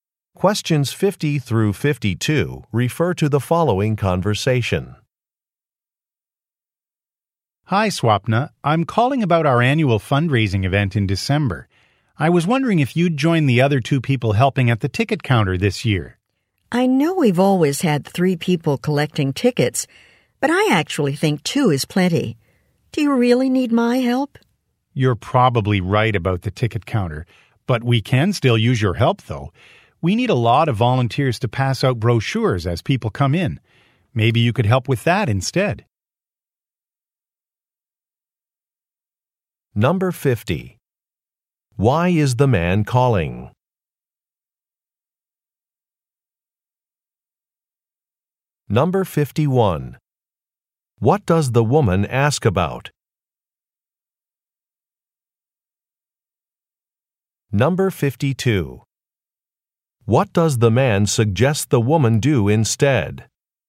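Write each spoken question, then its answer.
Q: Why is the man calling?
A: To ask her to help at the ticket counter at the fundraising event

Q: What does the woman ask about?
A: Whether her help is really needed

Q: What does the man suggest the woman do instead?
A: Pass out brochures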